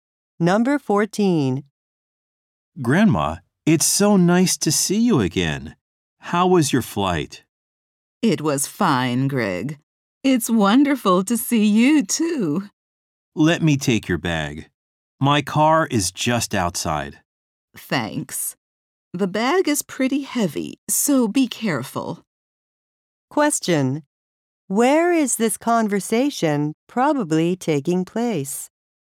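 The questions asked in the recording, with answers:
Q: Where is this conversation probably taking place?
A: At an airport.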